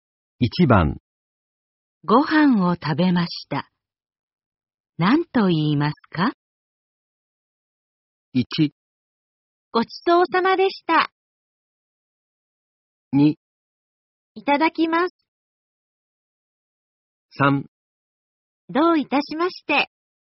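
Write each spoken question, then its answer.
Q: ご飯を食べました。何と言いますか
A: 1: ごちそうさまでした。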